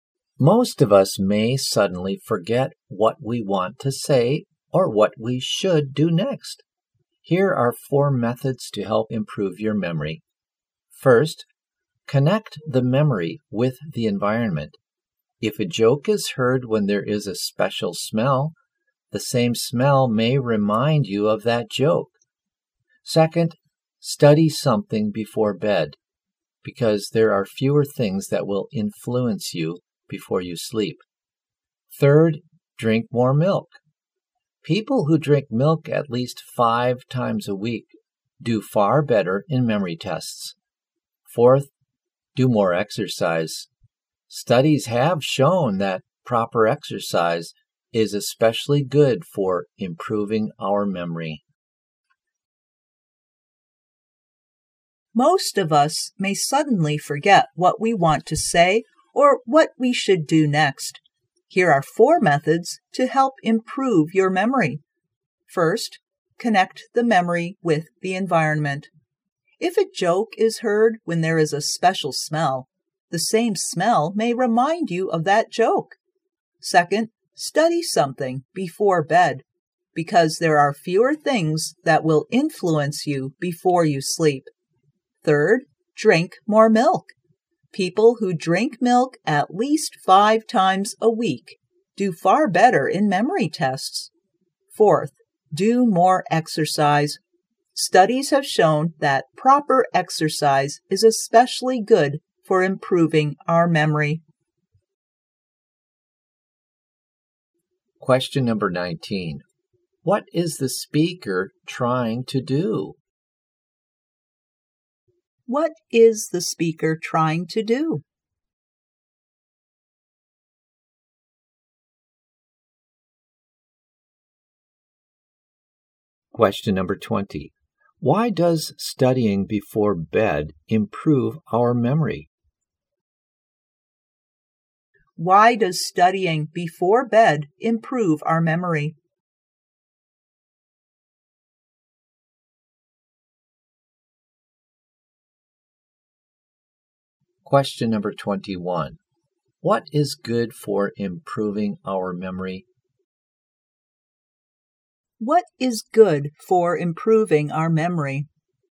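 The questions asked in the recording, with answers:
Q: What is the speaker trying to do?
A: Give ways to improve our memory

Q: Why does studying before bed improve our memory?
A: Fewer things will influence you before you sleep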